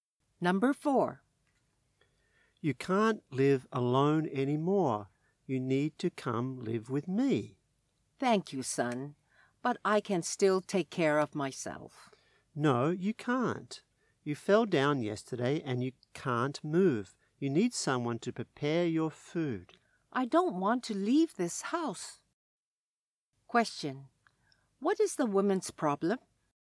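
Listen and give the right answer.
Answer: She fell down and can't move, so she can't live alone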